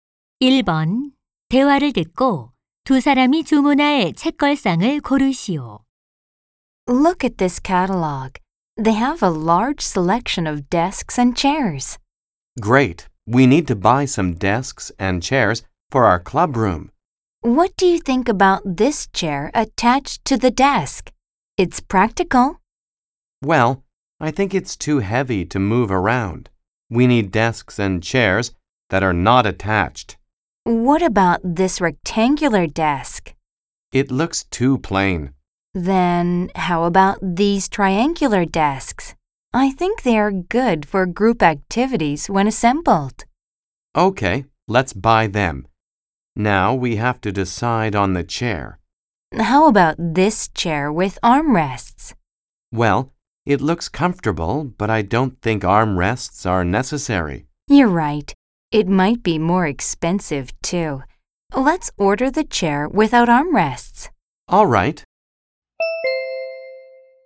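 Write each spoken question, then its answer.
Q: 대화를 듣고 두 사람이 주문할 책걸상을 고르시오.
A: 삼각형 책상과 팔걸이 없는 의자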